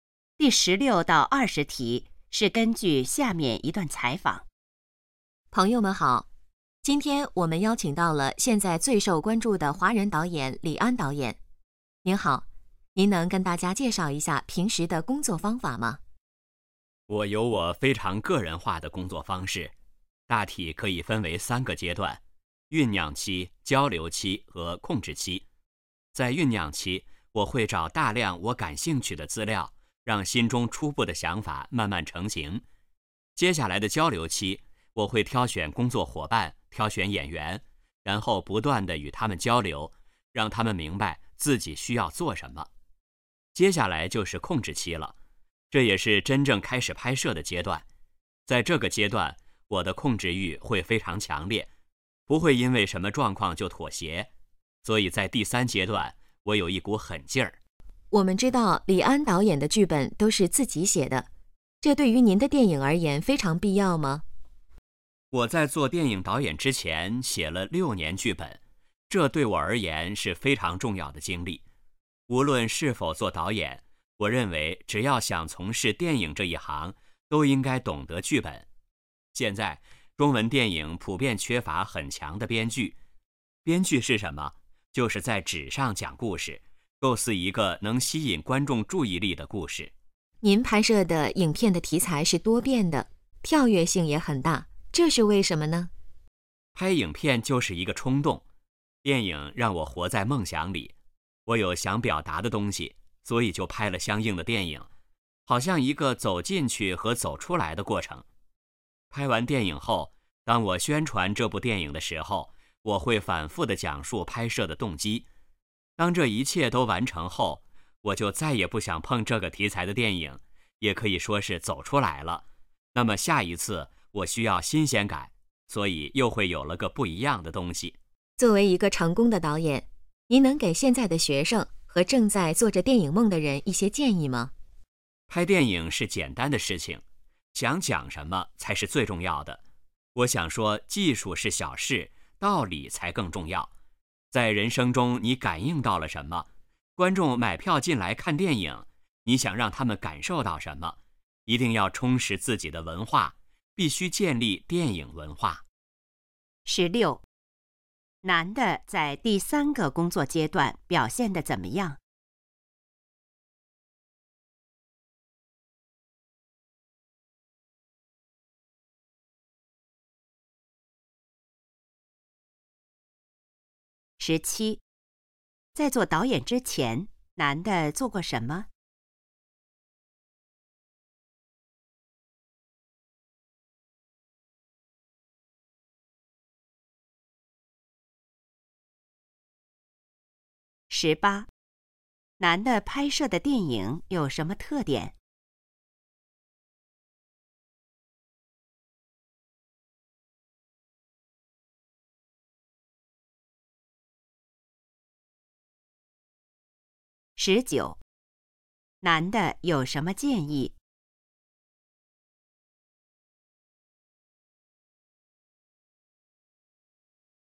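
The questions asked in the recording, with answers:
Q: 男的在第三个工作阶段表现得怎么样?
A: 控制欲非常强烈,有一股狠劲儿

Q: 在做导演之前,男的做过什么?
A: 写了6年剧本

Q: 男的拍摄的电影有什么特点?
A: 题材多变,跳跃性大

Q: 男的有什么建议?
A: 充实自己的文化,道理比技术更重要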